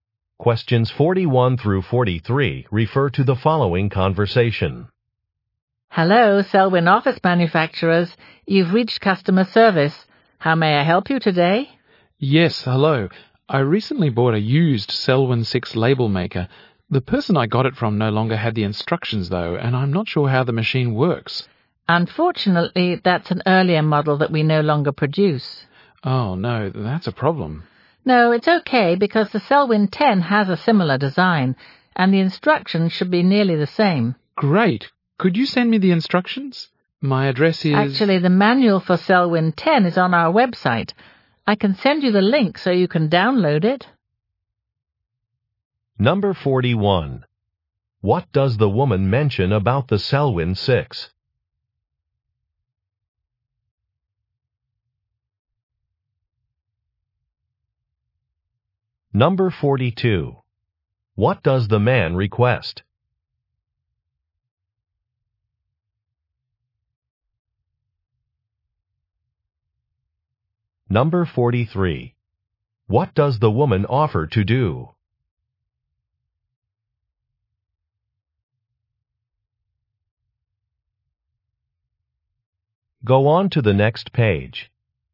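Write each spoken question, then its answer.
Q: What does the woman mention about the Selwyn 6?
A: It is no longer produced

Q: What does the man request?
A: The instructions

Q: What does the woman offer to do?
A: Send a link to download the manual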